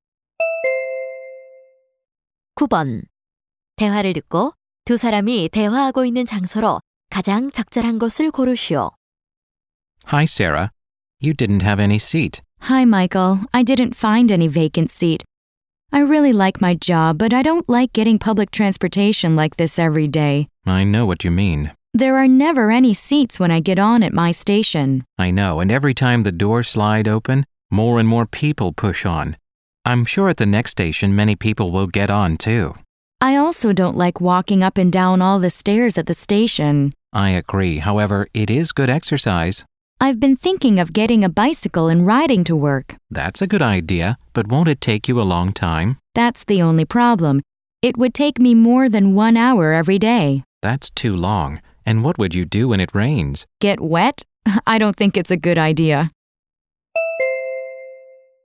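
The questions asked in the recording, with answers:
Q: 대화를 듣고 두 사람이 대화하고 있는 장소로 가장 적절한 곳을 고르시오.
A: 지하철 안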